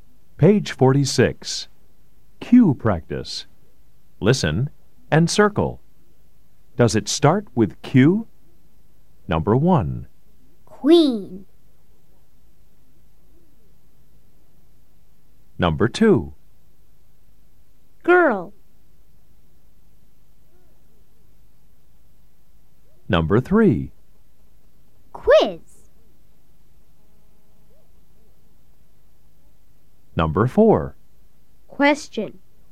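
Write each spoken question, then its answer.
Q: Does it start with Q? Number 1. Queen.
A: Yes

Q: Girl.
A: No

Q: Quiz.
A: Yes

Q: Question.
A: Yes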